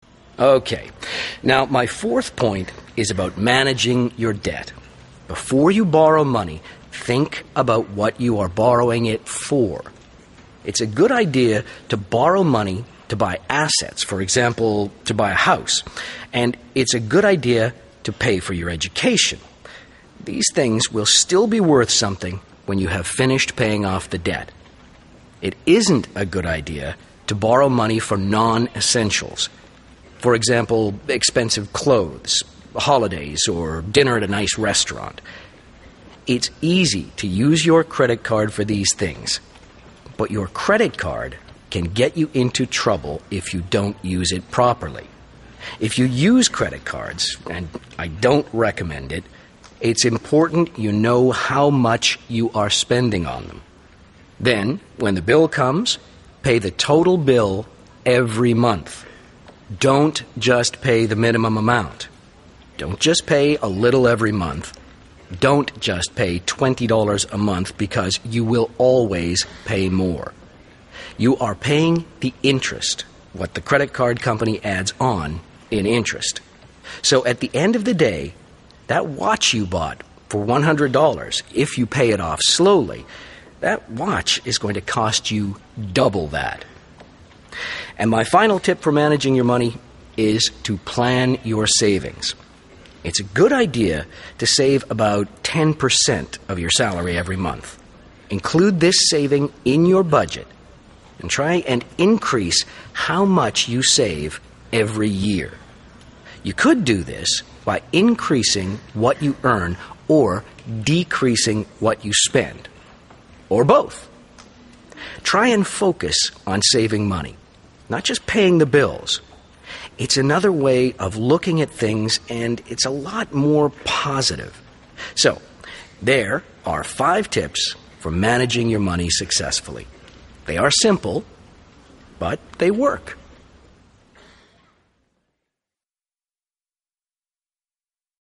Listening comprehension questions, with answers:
Now listen to the second part of Paul's seminar. Does Paul give the following advice?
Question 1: You should never borrow money.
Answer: NO

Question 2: You should use credit cards carefully.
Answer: YES

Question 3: As you start to earn more, you can save less.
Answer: NO

Listen again and complete Sara's notes below.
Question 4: borrow to buy assets e.g. a _____ or education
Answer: a house

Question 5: don't borrow money for things which aren't essential e.g. b _______________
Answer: expensive clothes, holidays, restaurants

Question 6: It's important to know how much you spend on your c _____ :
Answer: credit card

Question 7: pay the whole bill every d _____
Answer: month

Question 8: if you pay small amounts, you also pay e _____ so you pay more for something.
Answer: interest

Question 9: save f _____ per cent of your salary.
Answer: ten

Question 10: try to increase how much you save every g _____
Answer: year

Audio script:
OK, now fourth point is about managing your debt. Before you borrow money, think about what you are borrowing it for. It's a good idea to borrow money to buy assets, for example, to buy a house. And it's a good idea to pay for your education. These things will still be worth something when you have finished paying off the debt. It isn't a good idea to borrow money for non-essentials, for example, expensive clothes, holidays or dinner at a nice restaurant.
It's easy to use your credit card for these things, but your credit card can get you into trouble if you don't use it properly. If you use credit cards, and I don't recommend it, it's important you know how much you are spending on them. Then, when the bill comes, pay the total bill every month. Don't just pay the minimum amount, don't just pay a little every month, don't just pay 20 dollars a month because you will always pay more. You are paying the interest, what the credit card company adds on in internet. So at the end of the day, that watch you bought for 100 dollars, if you pay it off slowly, that watch is going to cost you double that.
And final tip for managing your money is to plan your savings. It's a good idea to save about ten per cent of your salary every month. include this saving in your budget and try and increase how much you save every year. You could do this by increasing what you earn or decreasing what you spend, or both! Try and focus on saving money, not just paying the bills. It's another way of looking at things and it's a lot more positive. So, there are five tips for managing your money successfully. They are simple but they work.